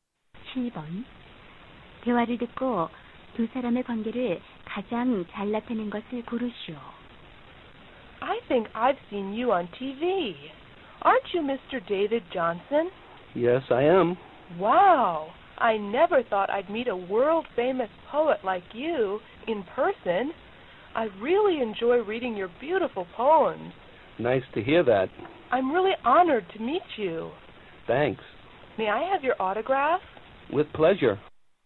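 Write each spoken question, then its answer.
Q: 대화를 듣고 두 사람의 관계를 가장 잘 나타낸 것을 고르시오.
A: 시인과 팬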